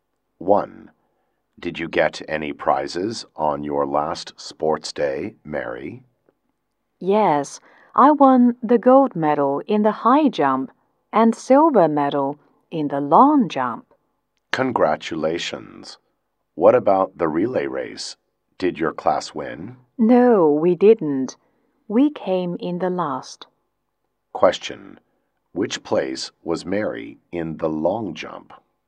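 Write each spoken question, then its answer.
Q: Which place was Mary in the long jump?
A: Second (silver medal)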